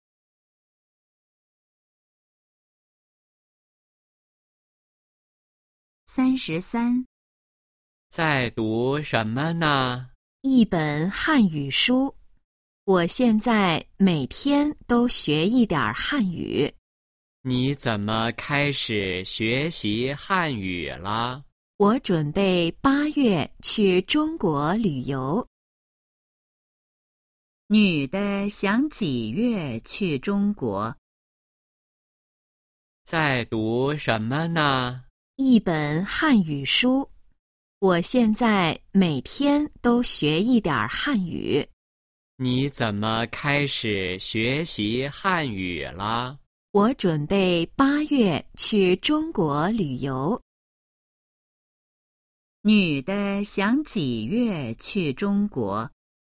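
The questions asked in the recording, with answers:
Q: 女的想几月去中国?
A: 8月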